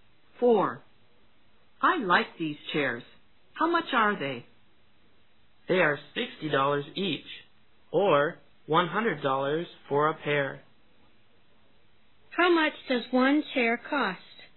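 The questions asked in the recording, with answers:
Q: How much does one chair cost?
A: $60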